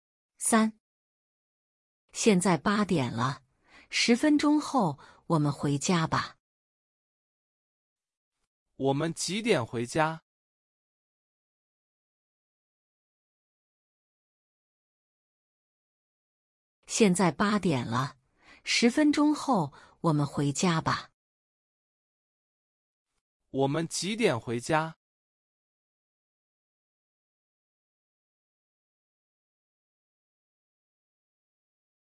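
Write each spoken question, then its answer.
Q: 我们几点回家?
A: 8点10分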